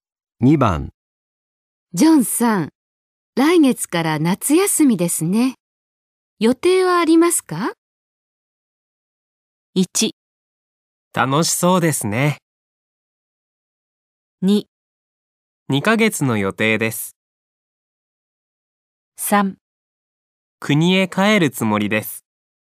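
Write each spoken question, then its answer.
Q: ジョンさん。来月から夏休みですね。予定はありますか?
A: 3: 国へ帰るつもりです。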